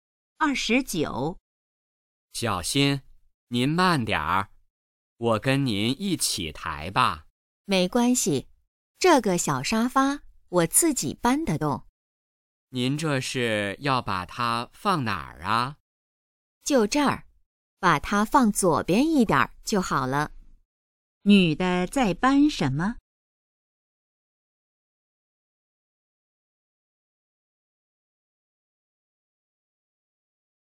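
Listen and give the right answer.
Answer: 小沙发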